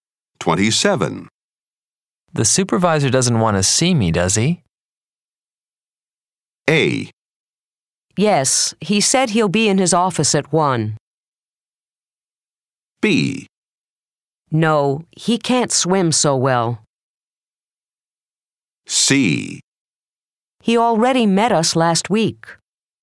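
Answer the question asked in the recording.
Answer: A: Yes, he said he'll be in his office at 1.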